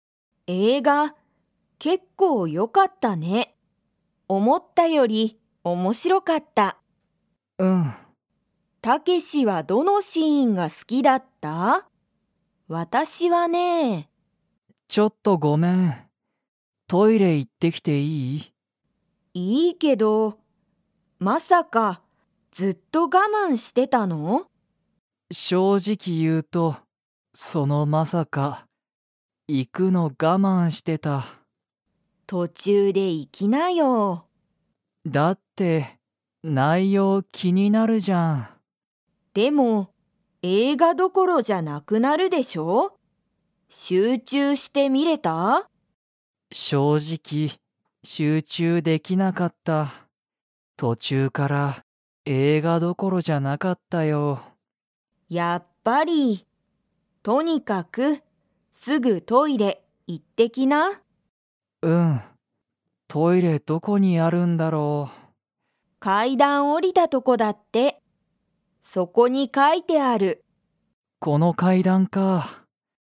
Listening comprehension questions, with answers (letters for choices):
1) タケシは集中しゅうちゅうして映画えいがを観みれましたか?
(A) はい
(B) いいえ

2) トイレは、 にある。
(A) お店みせの外そと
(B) ご飯はんを食たべるとこ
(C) 階段かいだんを下おりたとこ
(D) 階段かいだんに行いく途中とちゅう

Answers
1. B
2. C

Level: Level 4